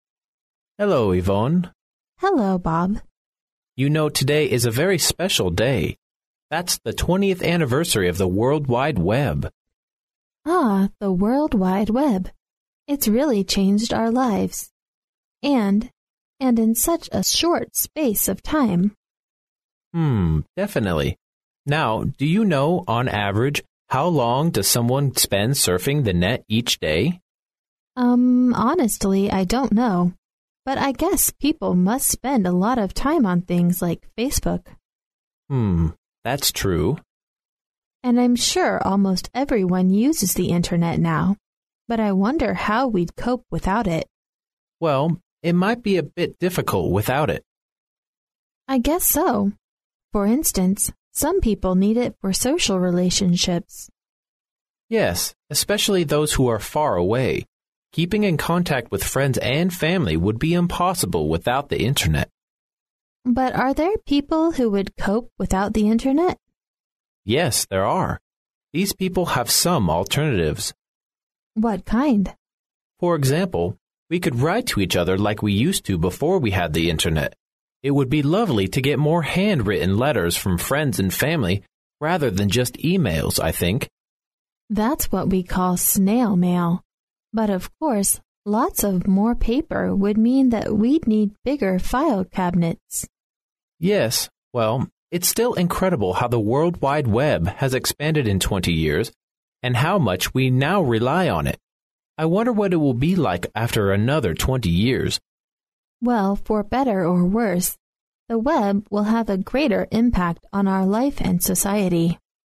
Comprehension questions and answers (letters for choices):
Questions 18 to 20 are based on the following conversation. At the end of the conversation, you will be given 20 seconds to answer the questions. Now listen to the conversation.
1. According to the conversation, the day is special because ______.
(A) many people are surfing the net on that day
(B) it is an anniversary of the internet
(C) the net brought about no changes until that day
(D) big changes will take place on that day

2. We learn from the conversation that people ______.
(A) cannot live without the internet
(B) cannot work without the internet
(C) all use the internet to keep in touch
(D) have varied opinions about internet use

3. At the end of the conversation, the speakers talk about ______.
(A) the future of the internet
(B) the type of office furniture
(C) when changes will come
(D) how people will use the internet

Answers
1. B
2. D
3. A

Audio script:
[听力原文] M: Hello, Yvonne. W: Hello, Bob. M: You know today is a very special day. That's the 20th anniversary of the World Wide Web. W: Ah, the World Wide Web. It's really changed our lives. And...and in such a short space of time. Now, do you know, on average, how long does someone spend surfing the net each day? W: Umm, honestly I don't know. But I guess people must spend a lot of time on things like Facebook. M: Hmm...that's true. W: And I'm sure almost everyone uses the internet now—but I wonder how we'd cope without it? M: Well, it might be a bit difficult without it. W: I guess so. For instance, some people need it for social relationships. M: Yes, especially those who are far away. Keeping in contact with friends and family would be impossible without the internet. W: But are there people who would cope without the internet? M: Yes, there are. These people have some alternatives. W: What kind? M: For example, we could write to each other like we used to before we had the internet. It would be lovely to get more hand-written letters from friends and family rather than just e-mails, I think. W: That's what we call "snail-mail". But of course, lots of more paper would mean that we'd need bigger file cabinets. M: Yes, well, it's still incredible how the World Wide Web has expanded in twenty years, and how much we now rely on it. I wonder what it will be like after another twenty years. W: Well, for better or worse, the web will have a greater impact on our life and society.